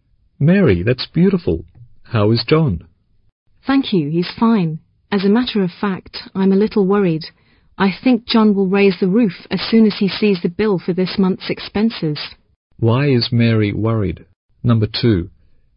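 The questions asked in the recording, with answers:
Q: Why is Mary worried?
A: John will be angry when he sees this month's bill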